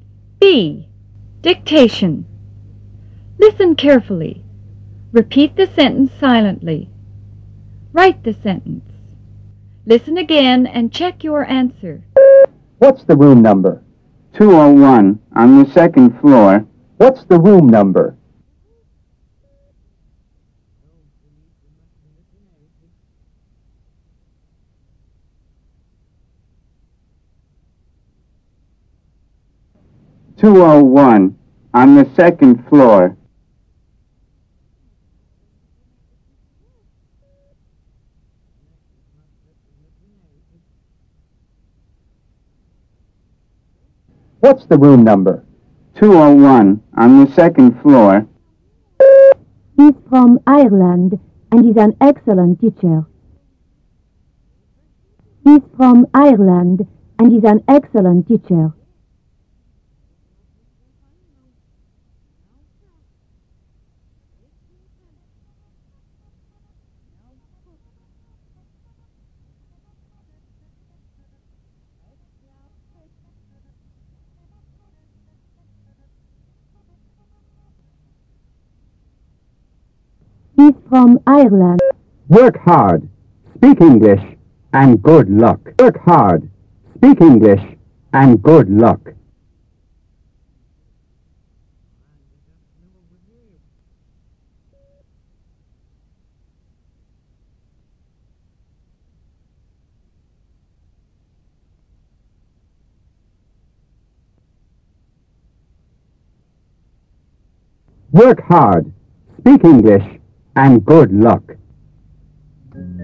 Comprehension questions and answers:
Directions : Listen carefully. Repeat the sentence silently. Write the sentence. Listen again and check your answer.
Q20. Work ___20___, speak English, and good luck!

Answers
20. hard